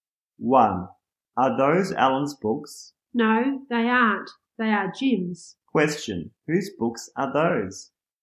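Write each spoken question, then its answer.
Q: Whose books are those?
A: Jim's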